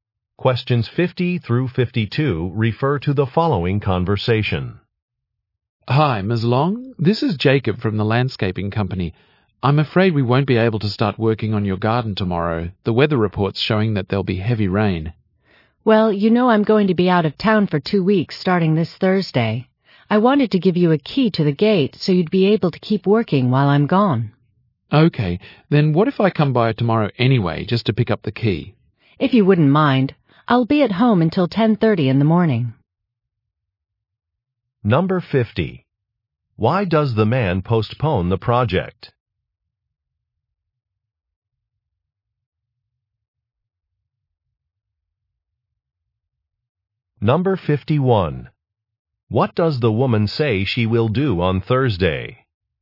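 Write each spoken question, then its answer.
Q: Why does the man postpone the project?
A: Heavy rain is forecast

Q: What does the woman say she will do on Thursday?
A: Go out of town for two weeks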